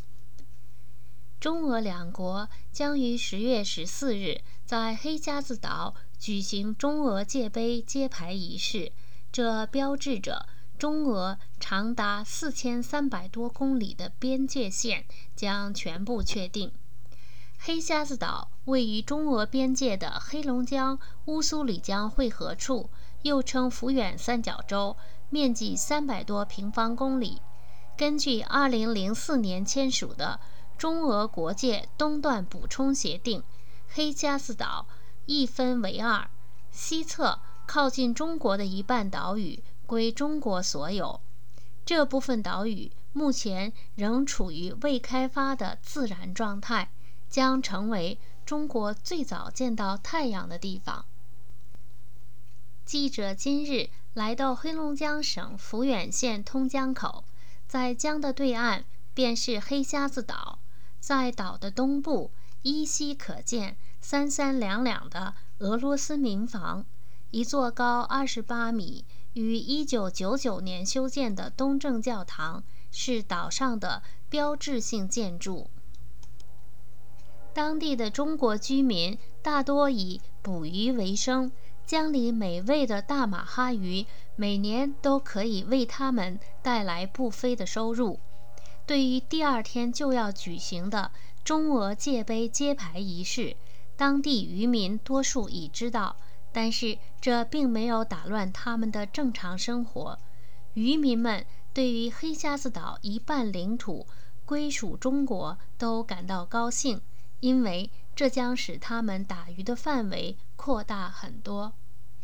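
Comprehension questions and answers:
Please answer the following questions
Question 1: 中俄边界线有多长?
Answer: 4300多公里

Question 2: 黑瞎子岛面积多大?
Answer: 300多平方公里

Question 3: 黑瞎子岛上的标志性建筑是什么?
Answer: 一座高28米、1999年修建的东正教堂

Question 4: 当地的中国人对黑瞎子岛回归的态度是什么?为什么?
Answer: 感到高兴,因为打鱼的范围将扩大很多

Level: M.Phil Year 2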